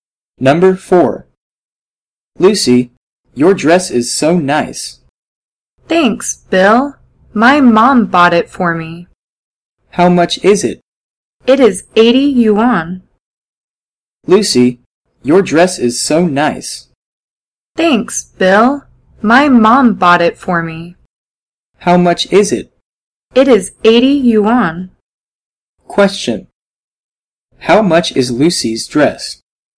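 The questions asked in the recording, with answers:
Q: How much is Lucy's dress?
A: 80 yuan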